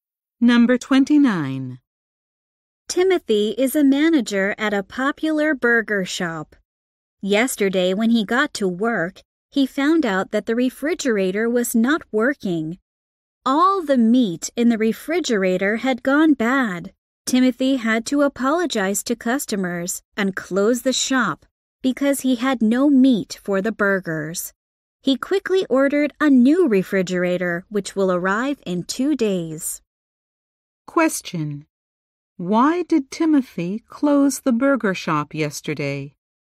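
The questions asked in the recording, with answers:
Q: Why did Timothy close the burger shop yesterday?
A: The refrigerator broke and the meat went bad.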